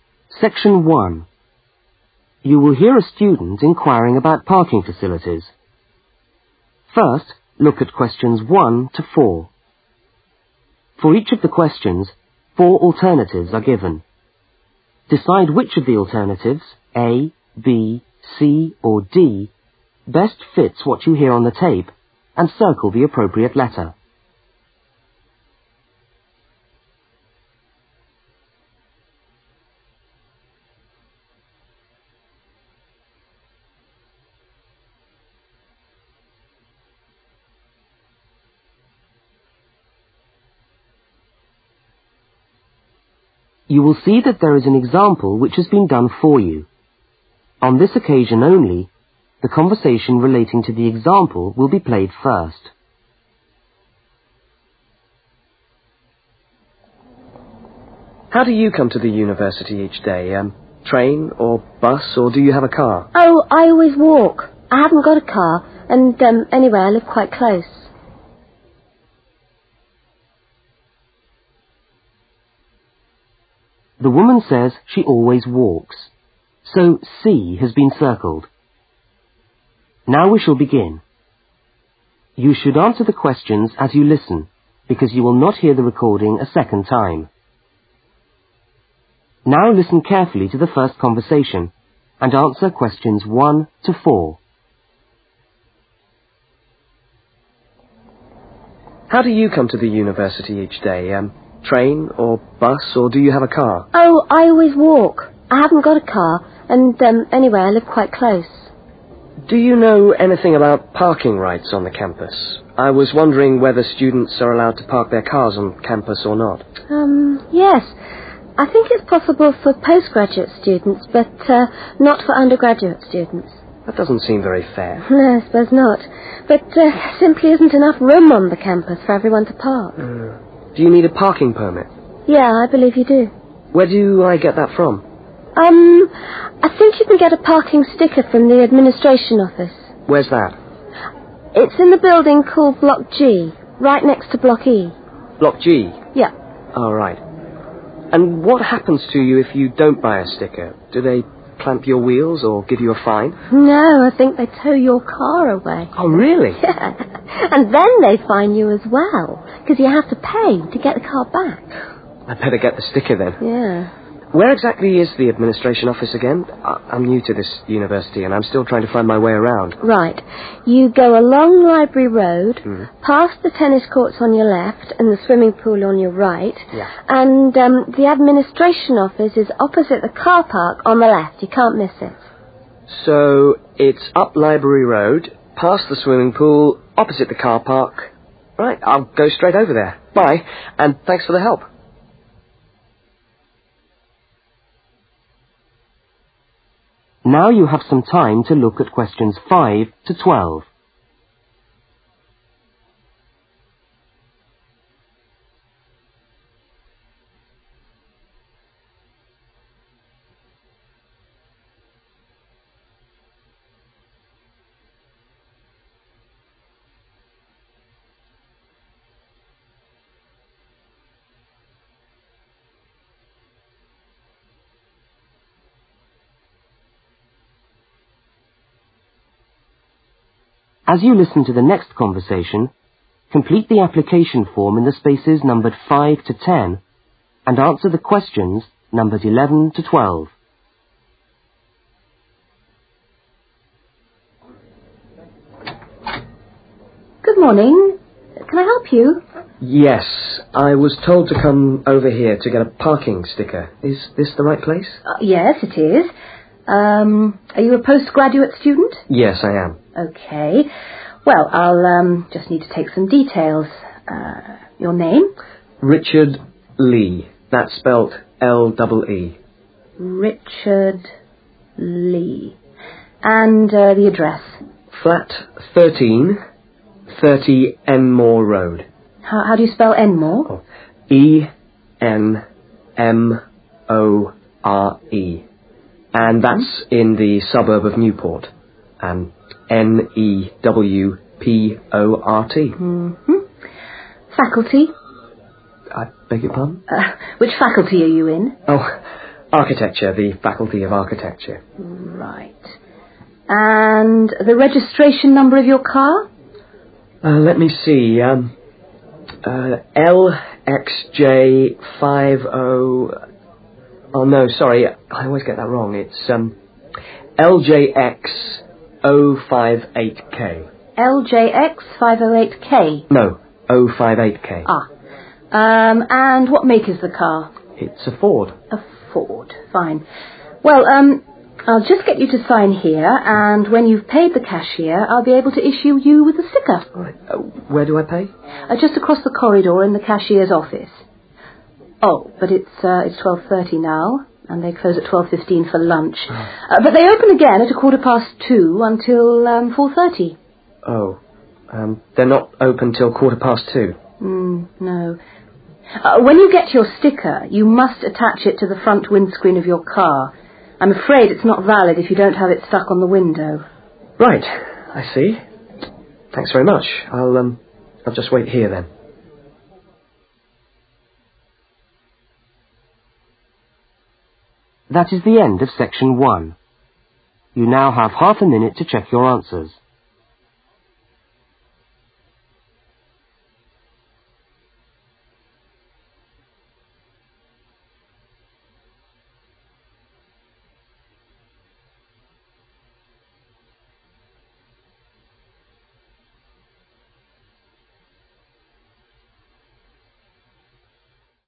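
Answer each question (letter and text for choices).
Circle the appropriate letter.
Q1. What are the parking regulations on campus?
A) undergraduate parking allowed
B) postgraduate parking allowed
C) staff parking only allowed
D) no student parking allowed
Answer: B) postgraduate parking allowed

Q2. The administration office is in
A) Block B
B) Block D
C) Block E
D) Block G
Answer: D) Block G

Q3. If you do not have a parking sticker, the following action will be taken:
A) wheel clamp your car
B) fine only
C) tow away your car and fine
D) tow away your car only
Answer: C) tow away your car and fine

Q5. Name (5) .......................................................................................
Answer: Richard Lee

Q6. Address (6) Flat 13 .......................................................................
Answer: 30 Enmore Road

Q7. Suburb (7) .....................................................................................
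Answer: Newport

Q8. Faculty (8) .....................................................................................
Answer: Architecture

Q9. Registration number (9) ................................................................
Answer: LJX058K

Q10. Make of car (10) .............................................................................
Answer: Ford

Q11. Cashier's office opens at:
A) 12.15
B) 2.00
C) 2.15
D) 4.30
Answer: C) 2.15

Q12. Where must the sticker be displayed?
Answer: front windscreen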